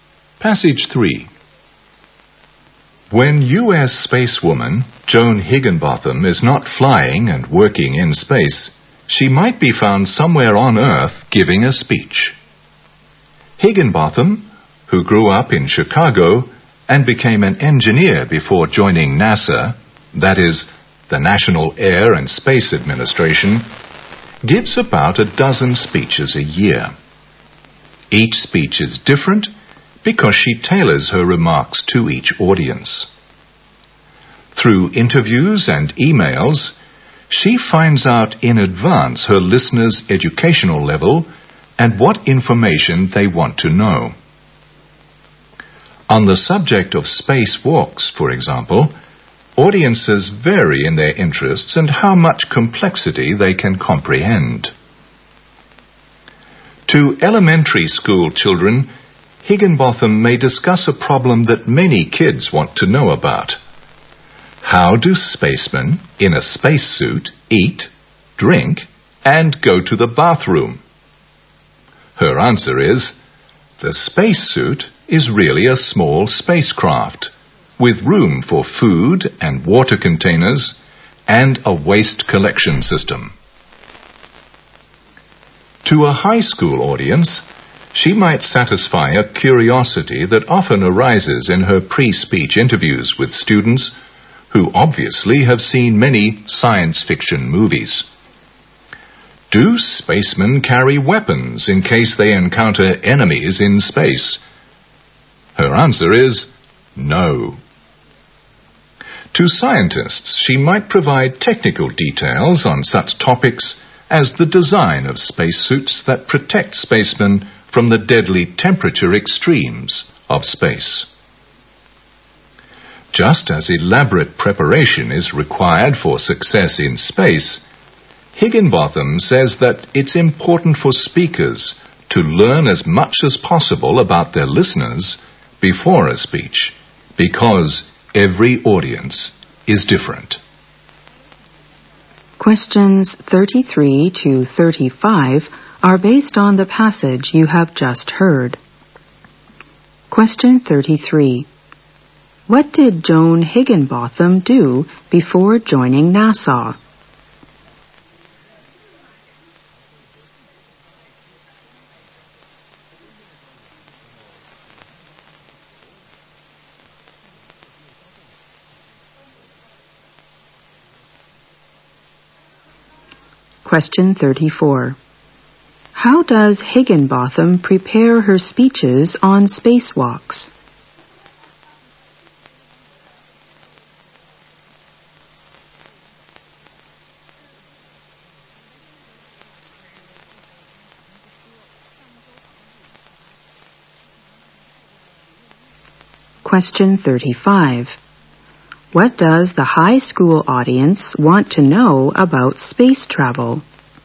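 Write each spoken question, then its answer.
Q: What did Joan Higginbotham do before joining NASA?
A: She was an engineer.

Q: How does Higginbotham prepare her speeches on spacewalks?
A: She learns about her audience in advance through interviews and emails.

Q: What does the high school audience want to know about space travel?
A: Whether spacemen carry weapons in case they meet enemies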